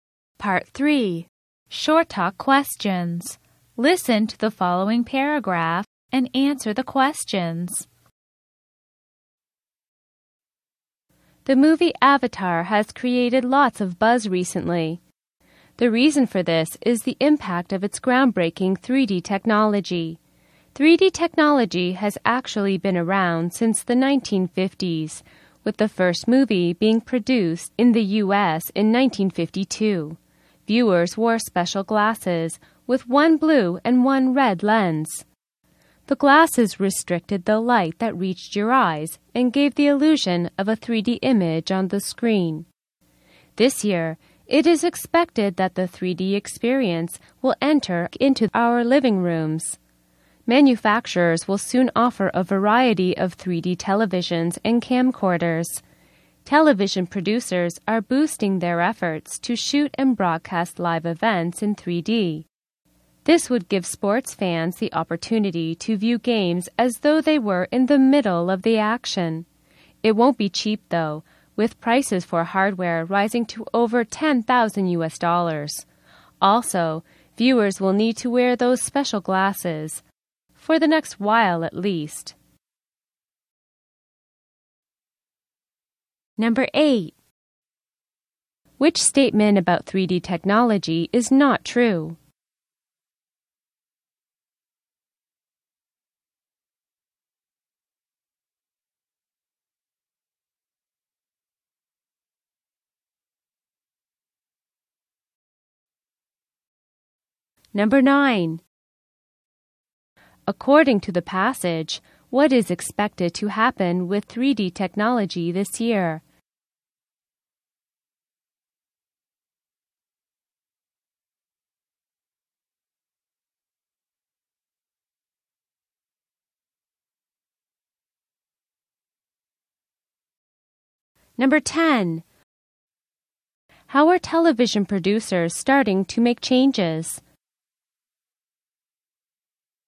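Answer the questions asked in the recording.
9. It will enter living rooms with 3D TVs and camcorders
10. By boosting efforts to shoot and broadcast live events in 3D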